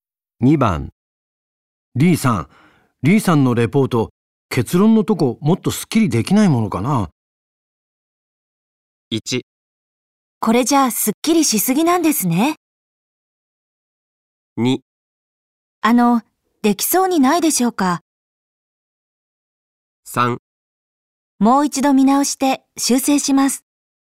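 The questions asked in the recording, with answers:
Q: リーさんのレポート、結論のとこもっとすっきりできないものかな。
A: 3: もう一度見直して修正します。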